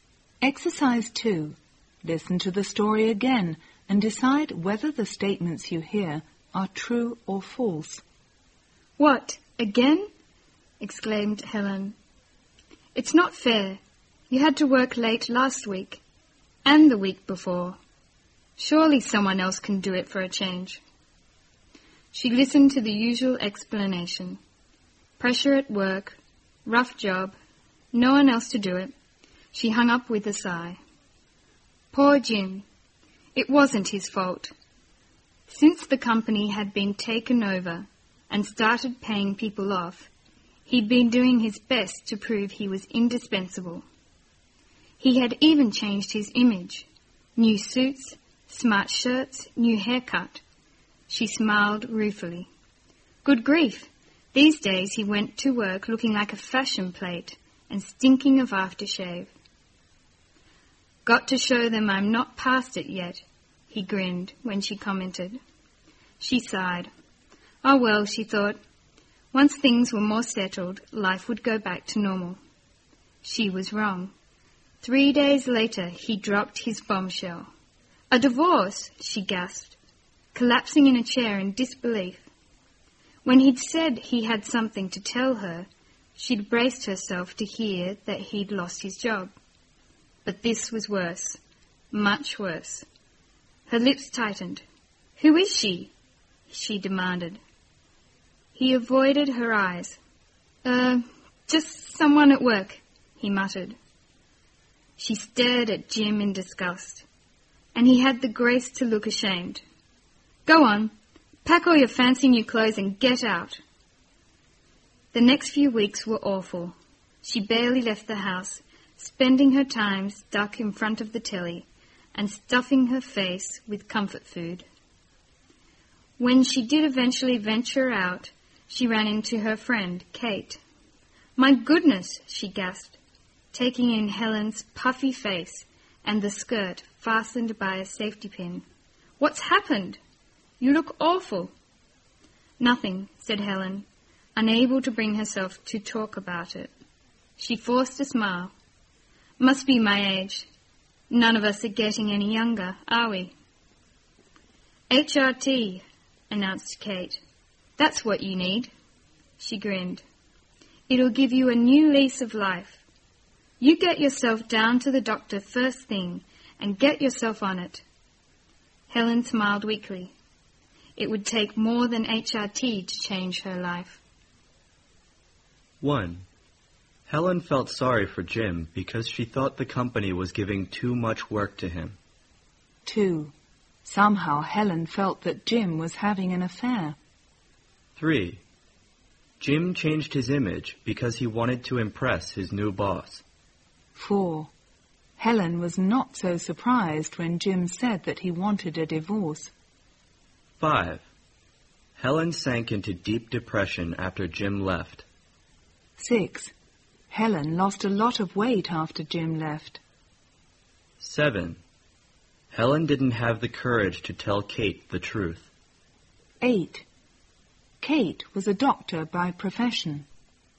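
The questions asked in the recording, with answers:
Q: Somehow Helen felt that Jim was having an affair.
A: False

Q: Helen was not so surprised when Jim said that he wanted a divorce.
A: False

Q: Helen lost a lot of weight after Jim left.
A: False

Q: Helen didn't have the courage to tell Kate the truth.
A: True

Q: Kate was a doctor by profession.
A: False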